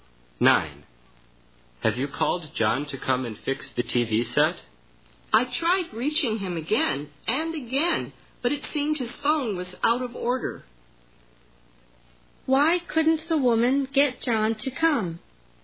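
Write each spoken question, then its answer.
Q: Why couldn't the woman get John to come?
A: His phone was out of order.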